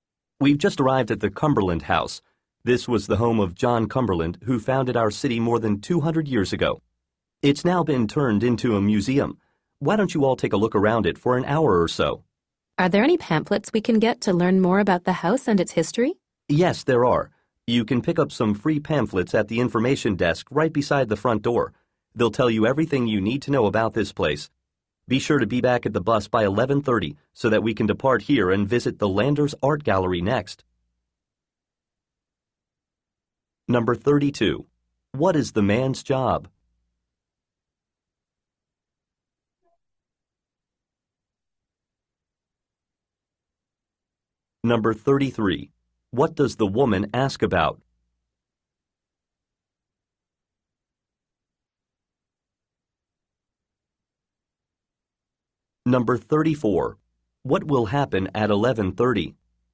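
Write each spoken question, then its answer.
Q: What is the man's job?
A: Tour guide

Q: What does the woman ask about?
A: Pamphlets about the house and its history

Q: What will happen at 11:30?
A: The group will leave on the bus for the Landers Art Gallery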